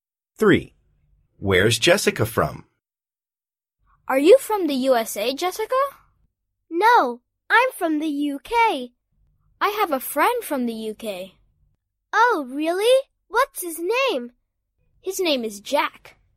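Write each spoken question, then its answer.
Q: Where's Jessica from?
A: The UK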